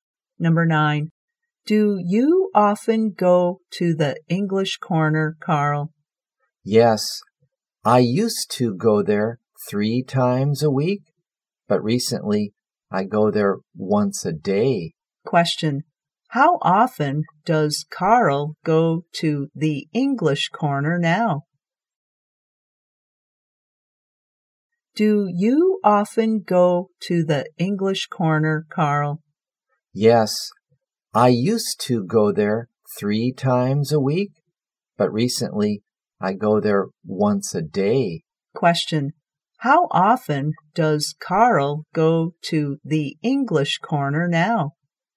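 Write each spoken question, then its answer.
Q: how often does Carl go to the English Corner now?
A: Once a day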